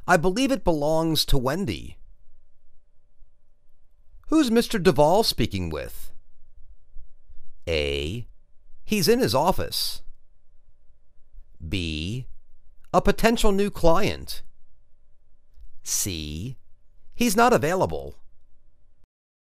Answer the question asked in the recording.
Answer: A potential new client.